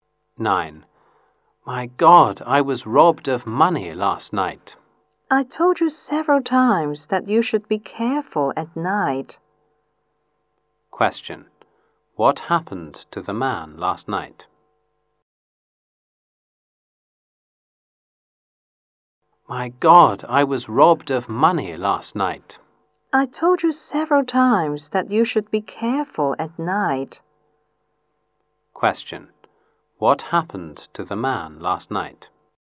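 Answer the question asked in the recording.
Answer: He was robbed of money.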